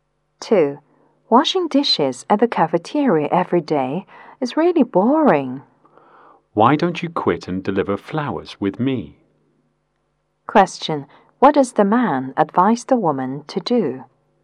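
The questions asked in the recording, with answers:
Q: What does the man advise the woman to do?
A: Quit her cafeteria job and deliver flowers with him.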